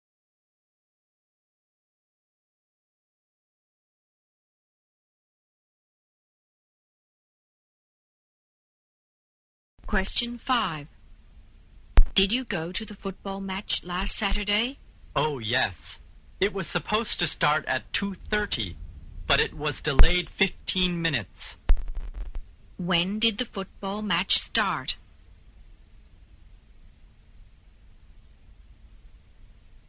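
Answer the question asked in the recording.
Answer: At 2:45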